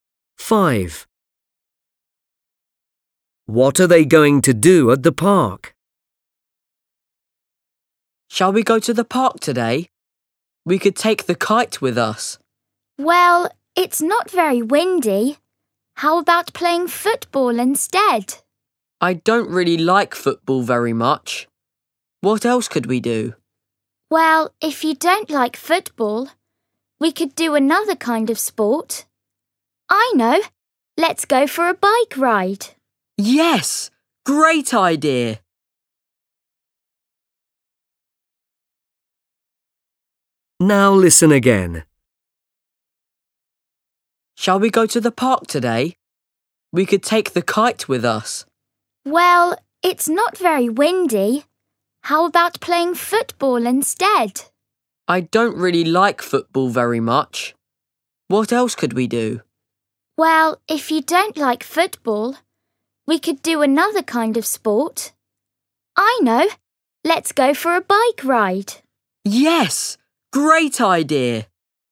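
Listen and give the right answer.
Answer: Go for a bike ride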